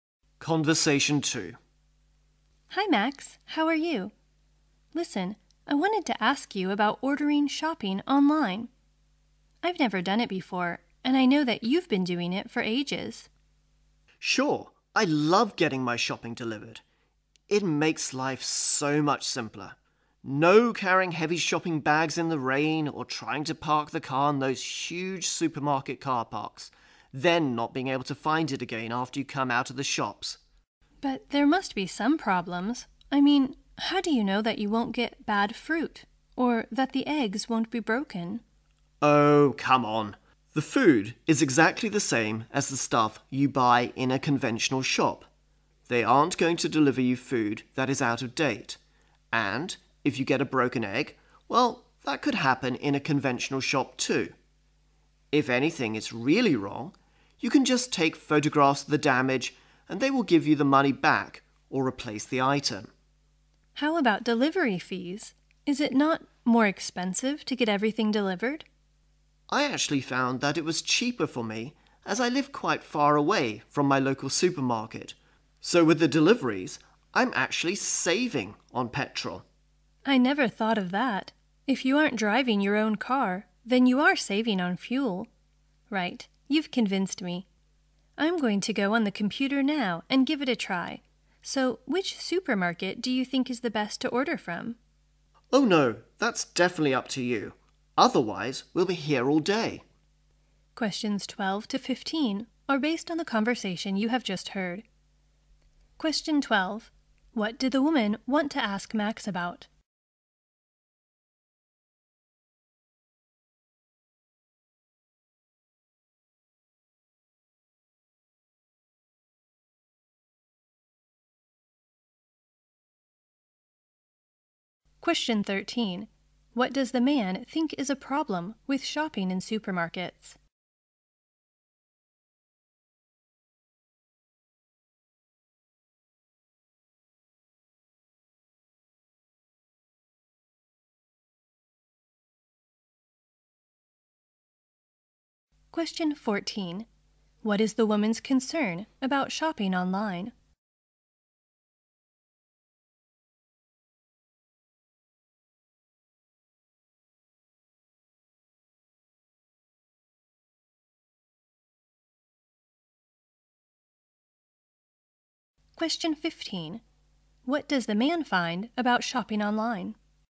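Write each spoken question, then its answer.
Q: What did the woman want to ask Max about?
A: Ordering shopping online

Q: What does the man think is a problem with shopping in supermarkets?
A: Carrying heavy bags and parking or finding the car in huge car parks

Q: What is the woman's concern about shopping online?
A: Getting bad fruit or broken eggs

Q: What does the man find about shopping online?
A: It is cheaper for him because he saves on petrol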